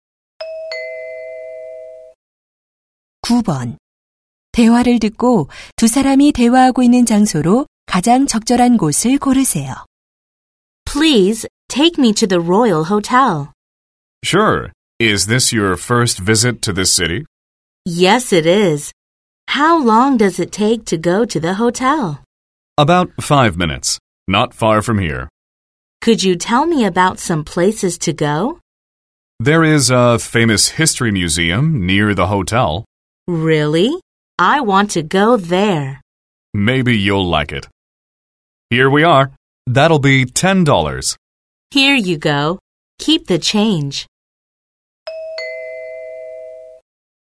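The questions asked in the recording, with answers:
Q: 대화를 듣고 두 사람이 대화하고 있는 장소로 가장 적절한 곳을 고르세요.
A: 택시 안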